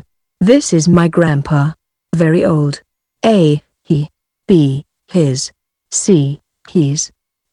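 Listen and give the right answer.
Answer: C: he's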